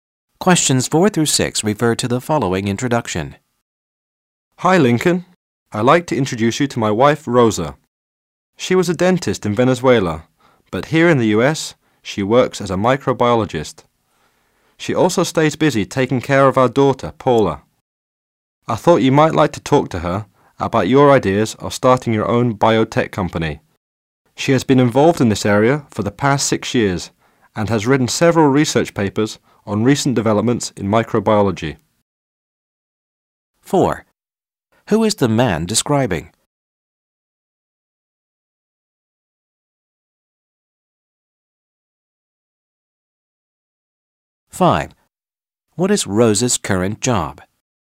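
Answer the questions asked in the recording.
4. His wife, Rosa
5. Microbiologist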